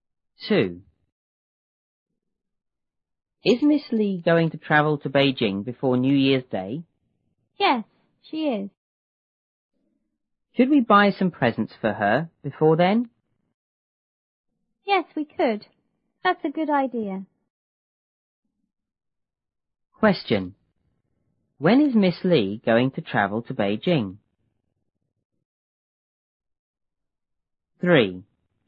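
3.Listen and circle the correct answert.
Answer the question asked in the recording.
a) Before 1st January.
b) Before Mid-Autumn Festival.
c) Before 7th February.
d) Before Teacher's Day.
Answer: a) Before 1st January.

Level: 初中英语广州版1B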